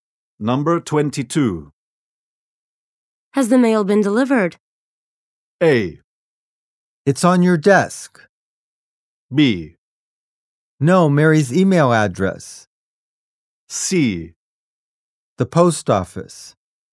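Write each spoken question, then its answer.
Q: Has the mail been delivered?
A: A: It's on your desk.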